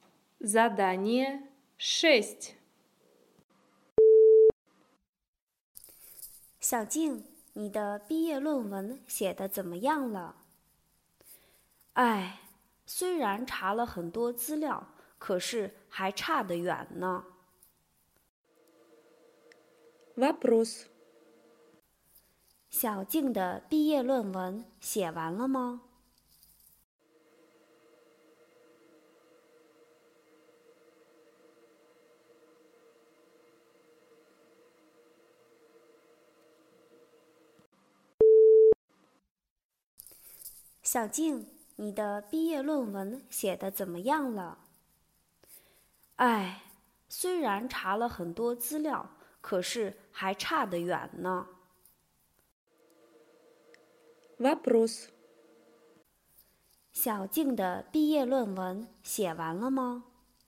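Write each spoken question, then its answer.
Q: 小静的毕业论文写完了吗?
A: 没写完,还差得远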